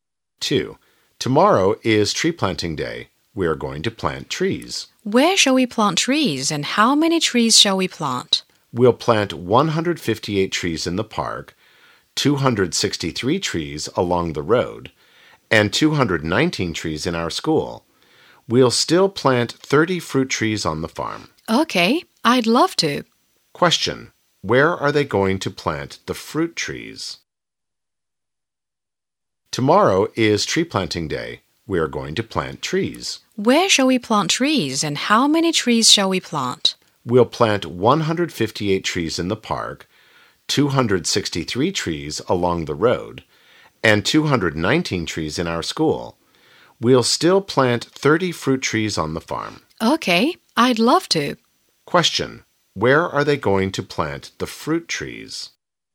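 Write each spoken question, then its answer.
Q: where are they going to plant the fruit trees?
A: On the farm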